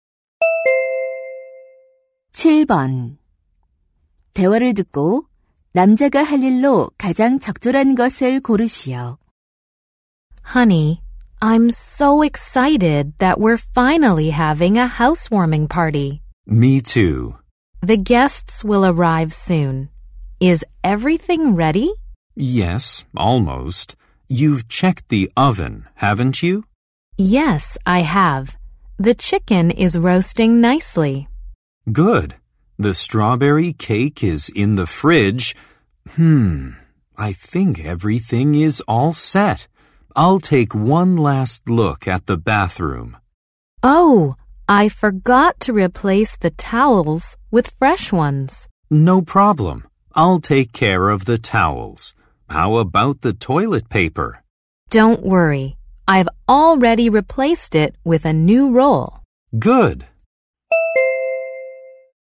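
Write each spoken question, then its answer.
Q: 대화를 듣고 남자가 할 일로 가장 적절한 것을 고르시오.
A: 욕실 수건 교체하기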